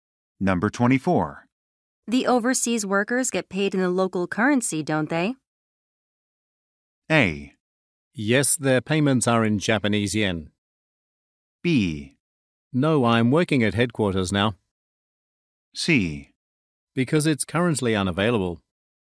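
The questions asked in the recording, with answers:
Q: The overseas workers get paid in the local currency, don't they?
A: A: Yes, their payments are in Japanese yen.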